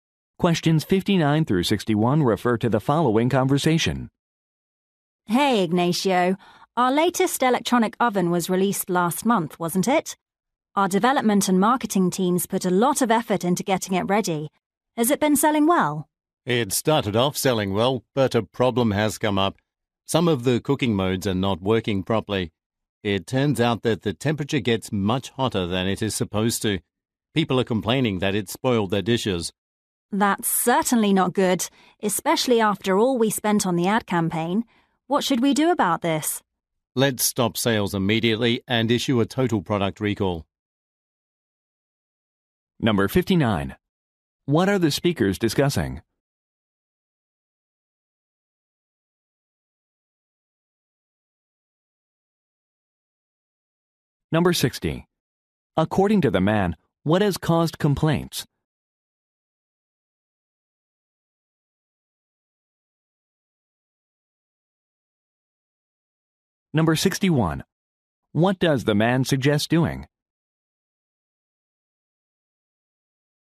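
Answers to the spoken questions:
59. A problem with a new oven
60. The oven gets too hot
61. Stopping sales and recalling the product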